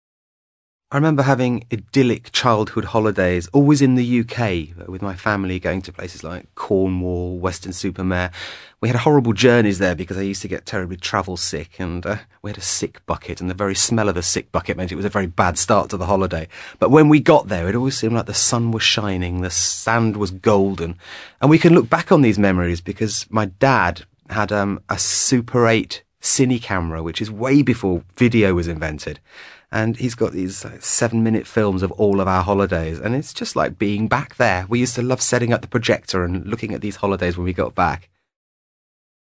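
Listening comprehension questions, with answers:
ACTIVITY 165: You will listen to two men talking about childhood holidays. After listening complete the two paragraphs below. Then check the correct answers.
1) The one thing he didn't like about the holidays was the , because he was always .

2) They are able to recall what these holidays were like because his father them.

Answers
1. journeys / travel sick
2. filmed

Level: CPE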